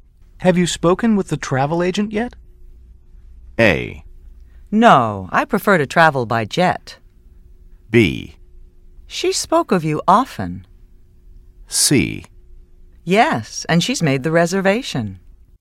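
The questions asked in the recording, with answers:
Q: Have you spoken with the travel agent yet?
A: C: Yes, and she's made the reservation.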